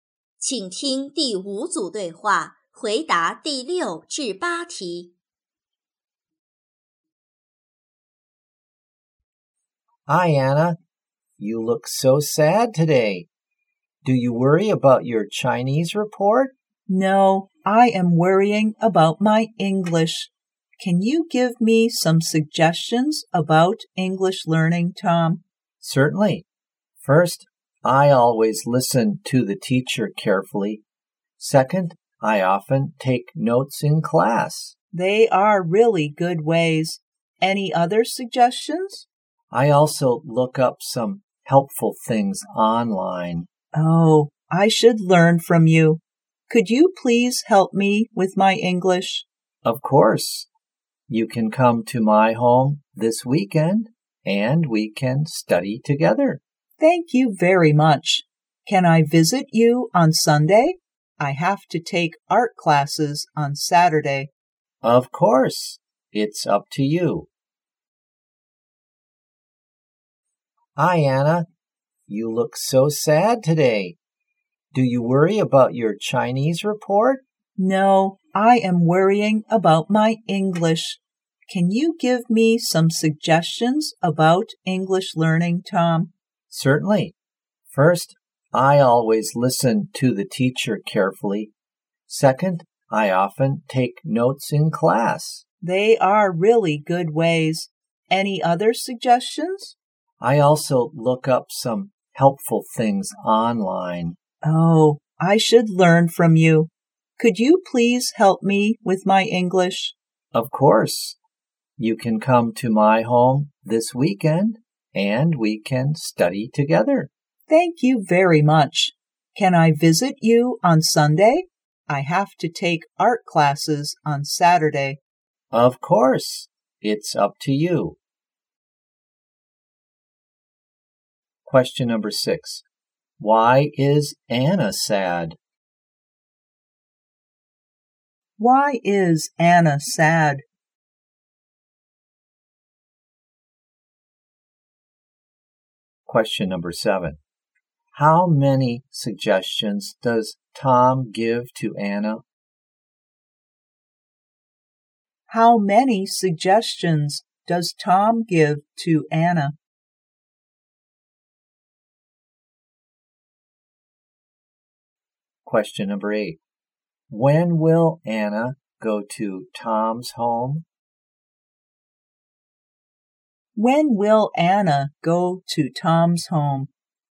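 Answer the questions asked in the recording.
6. She is worried about her English.
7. Three.
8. On Sunday.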